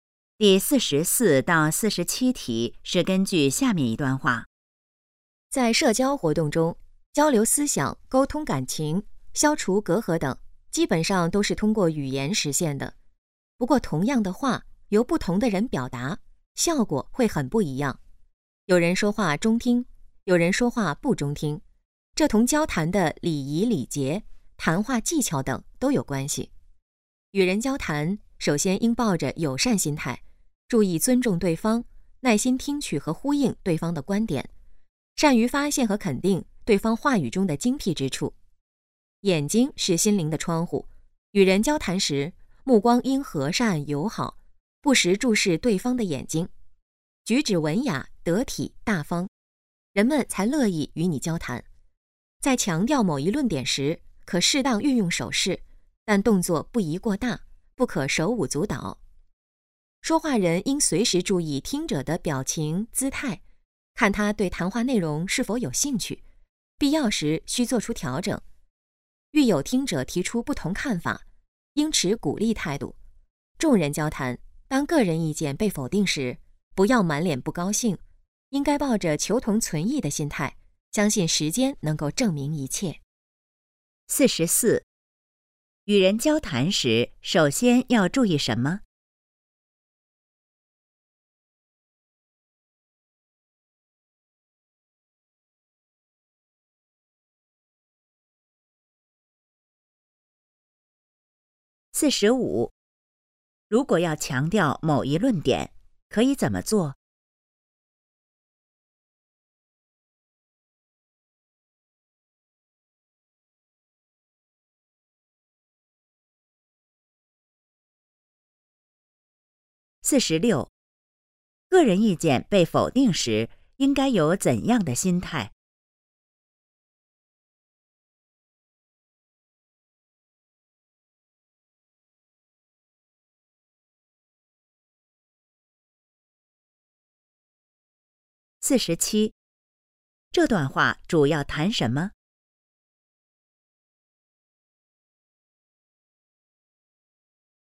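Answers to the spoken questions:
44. 抱着友善心态,尊重对方
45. 适当运用手势,但动作不宜过大
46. 求同存异
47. 与人交谈的礼仪和技巧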